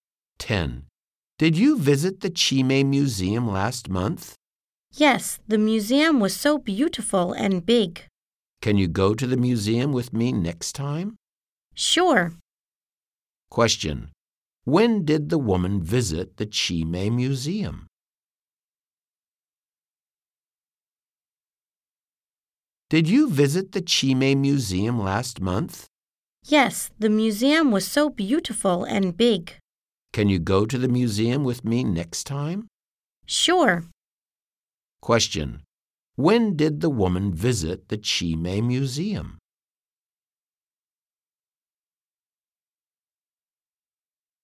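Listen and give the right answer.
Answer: Last month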